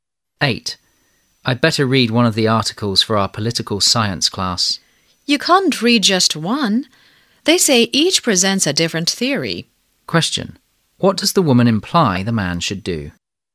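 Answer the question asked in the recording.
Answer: Read all the articles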